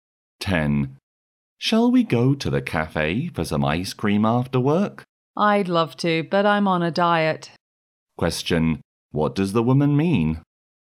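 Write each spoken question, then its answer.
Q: What does the woman mean?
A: She won't go for ice cream because she's on a diet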